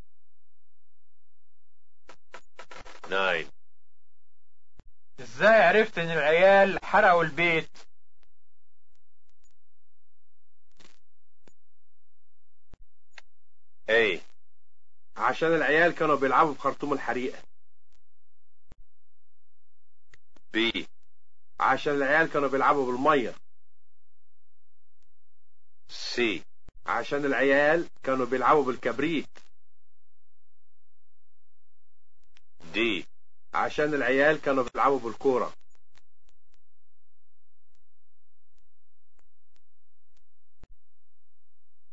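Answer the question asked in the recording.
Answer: C: عشان العيال كانوا بيلعبوا بالكبريت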